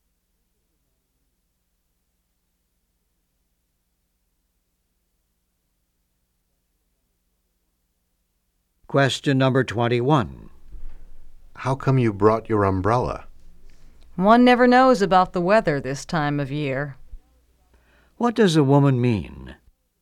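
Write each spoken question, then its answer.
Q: What does a woman mean?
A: The weather is unpredictable, so she brought it in case of rain.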